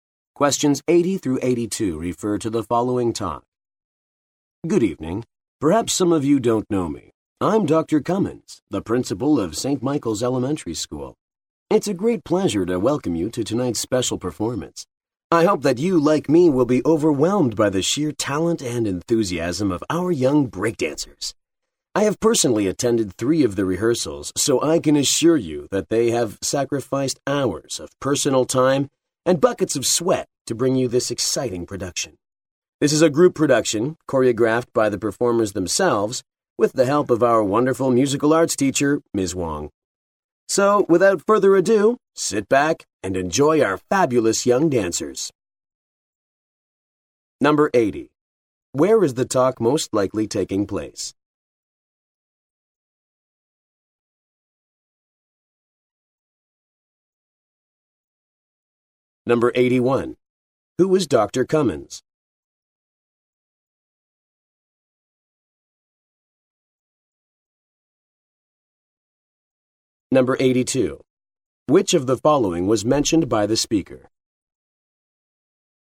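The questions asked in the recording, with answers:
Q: Where is the talk most likely taking place?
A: At a school performance

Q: Who is Dr. Cummins?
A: The principal of St. Michael's Elementary School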